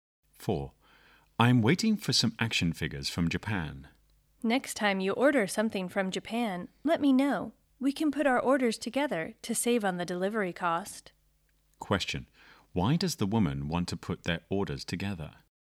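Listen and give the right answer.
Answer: To save on the delivery cost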